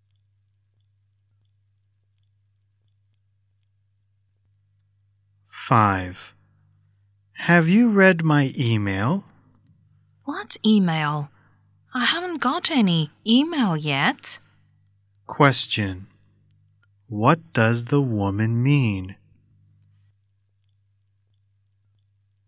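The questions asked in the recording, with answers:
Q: What does the woman mean?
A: She hasn't got any email yet.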